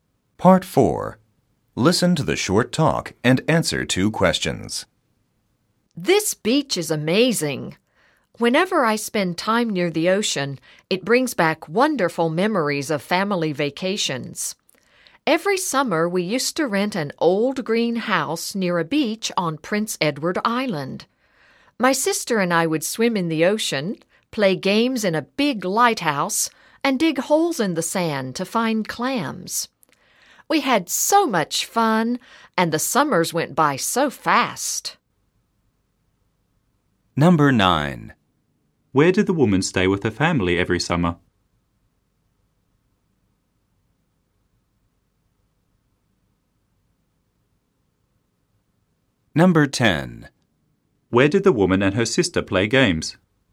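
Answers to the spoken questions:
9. In an old green house near a beach on Prince Edward Island.
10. In a big lighthouse.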